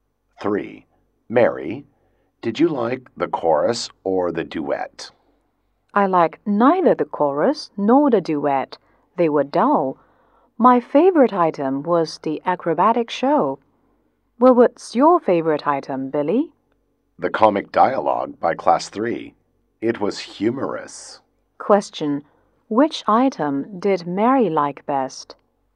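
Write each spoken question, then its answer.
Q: Which item did Mary like best?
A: The acrobatic show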